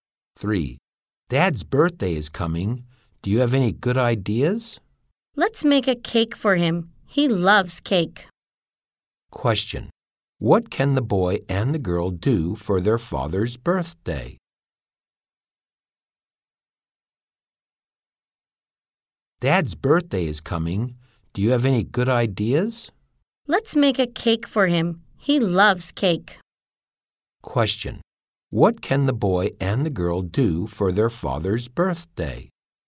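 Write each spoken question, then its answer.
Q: what can the boy and the girl do for their father's birthday?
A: Make a cake for him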